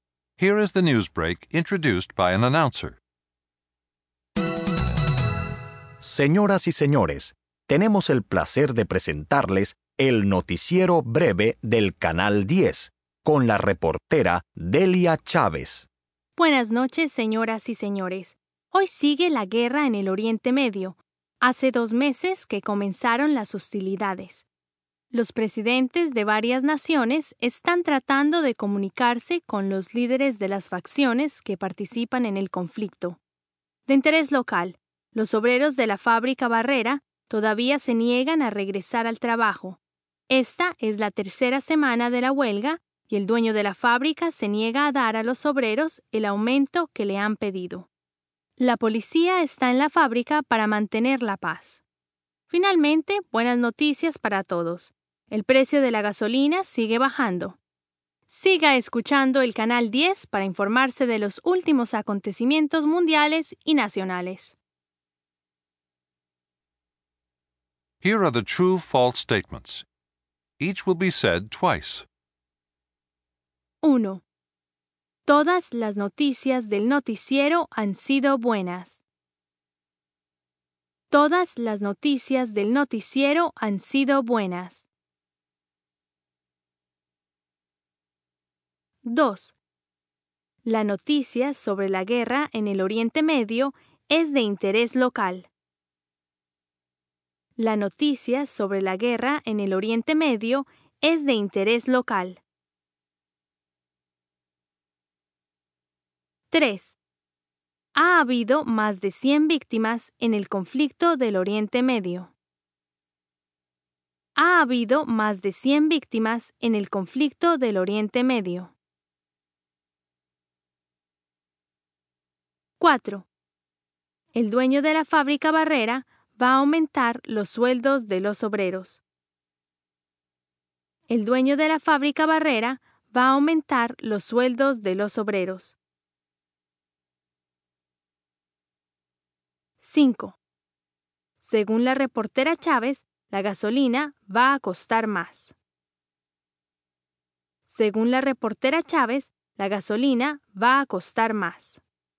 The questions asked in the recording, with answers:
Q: Ha habido más de 100 víctimas en el conflicto del Oriente Medio.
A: ND